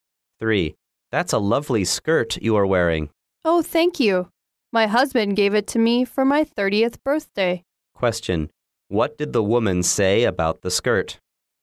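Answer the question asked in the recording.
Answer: Her husband gave it to her for her 30th birthday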